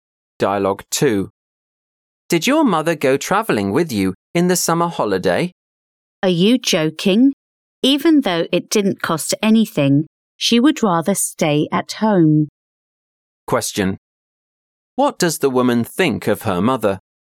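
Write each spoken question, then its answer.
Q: What does the woman think of her mother?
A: Her mother doesn't like travelling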